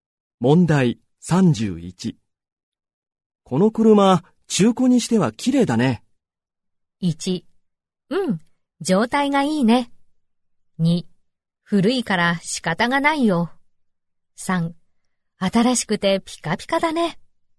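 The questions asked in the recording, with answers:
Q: この車、中古にしては綺麗だね。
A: 1: うん、状態がいいね。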